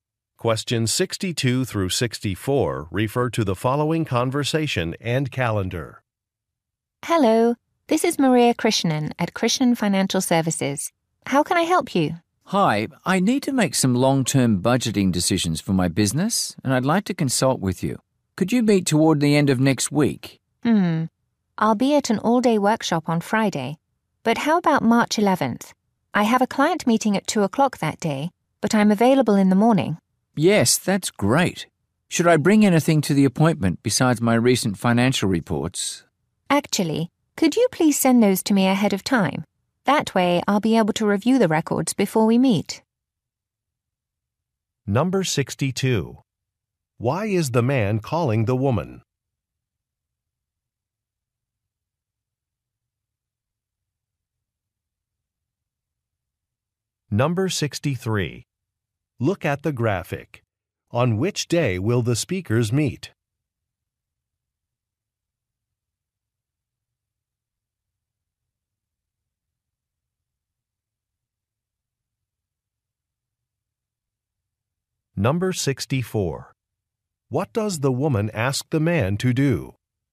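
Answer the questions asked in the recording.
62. To get advice on budgeting for his business
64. Send his financial reports ahead of time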